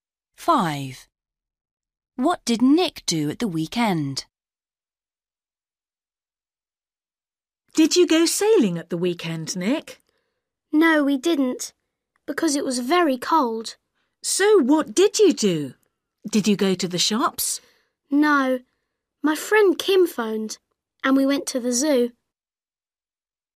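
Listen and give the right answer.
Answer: He went to the zoo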